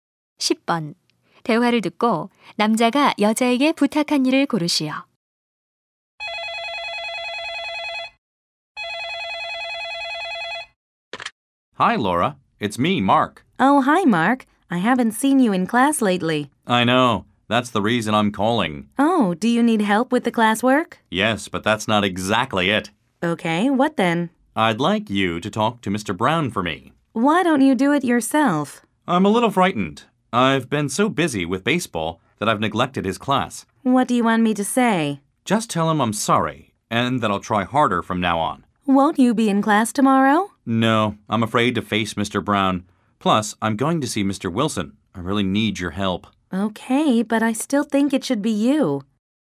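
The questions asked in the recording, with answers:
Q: 대화를 듣고 남자가 여자에게 부탁한 일을 고르시오.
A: Brown 선생님께 대신 사과를 전해 달라는 것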